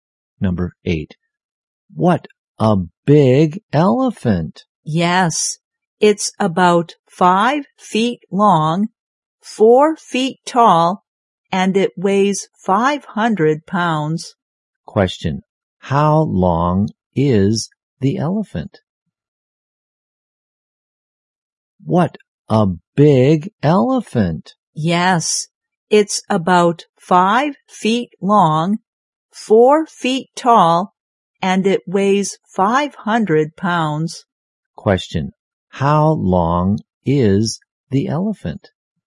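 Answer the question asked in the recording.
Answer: About 5 feet long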